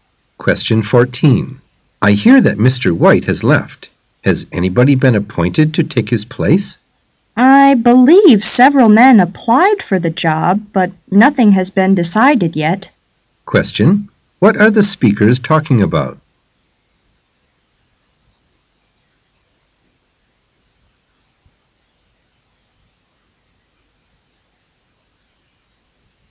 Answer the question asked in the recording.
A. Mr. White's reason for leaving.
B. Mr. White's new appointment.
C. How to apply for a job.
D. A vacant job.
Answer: D. A vacant job.